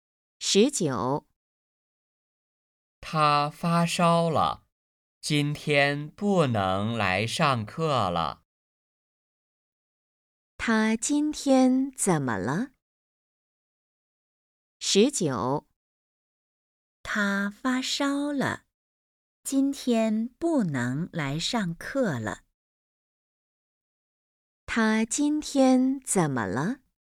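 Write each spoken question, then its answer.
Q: 他今天怎么了?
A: 发烧了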